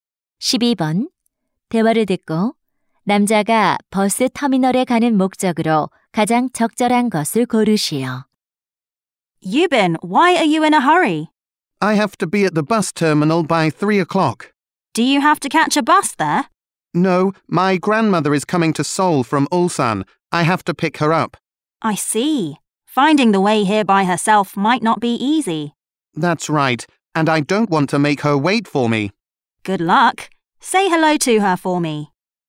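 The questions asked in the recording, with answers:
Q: 대화를 듣고 남자가 버스 터미널에 가는 목적으로 가장 적절한 것을 고르시오.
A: 할머니를 모시러 가기 위해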